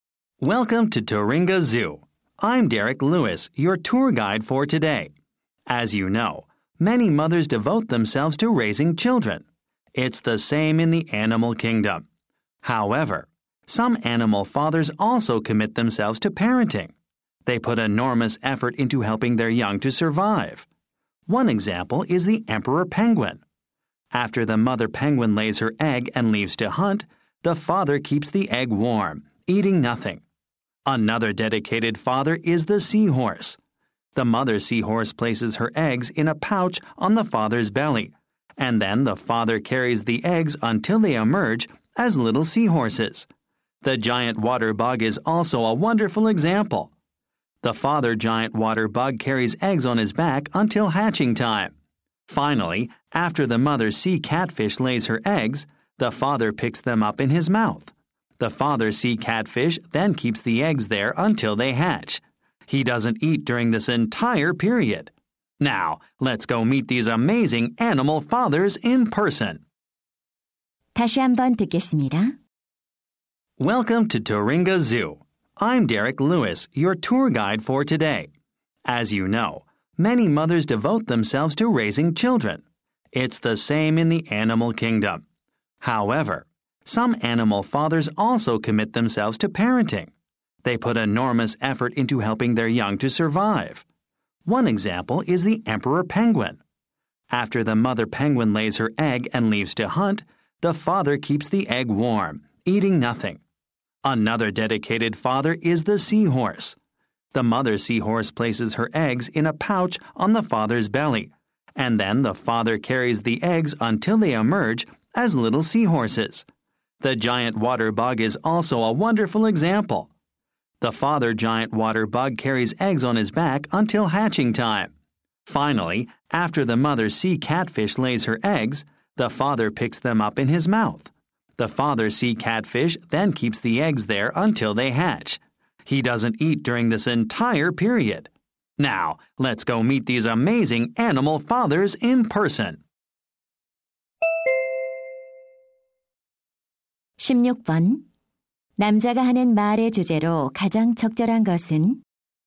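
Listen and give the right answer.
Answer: 새끼 양육에 헌신하는 동물 아빠들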